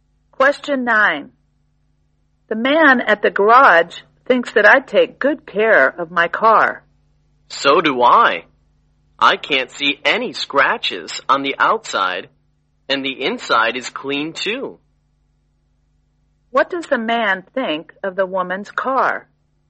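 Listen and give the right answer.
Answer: It is well cared for: clean and with no scratches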